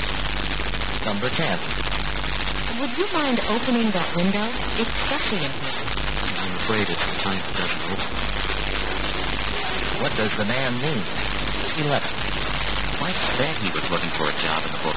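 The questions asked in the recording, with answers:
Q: What does the man mean?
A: The window can't be opened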